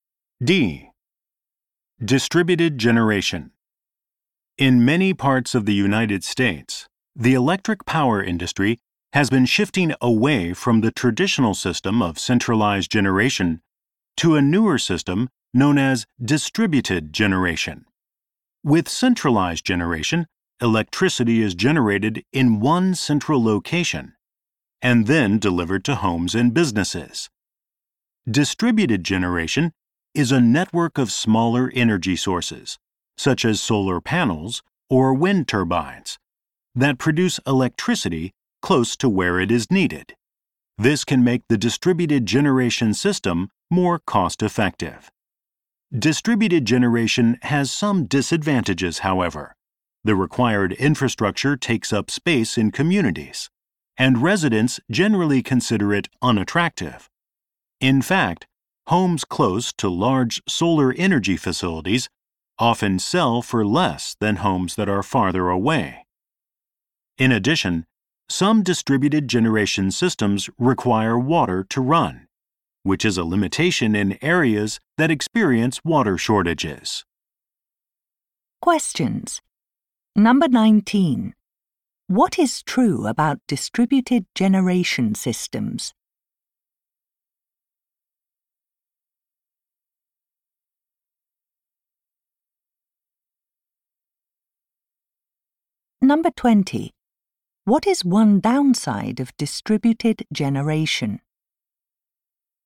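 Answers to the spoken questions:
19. They produce electricity close to where it is needed, which can make them more cost-effective.
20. Its infrastructure takes up space and is considered unattractive, and nearby homes sell for less.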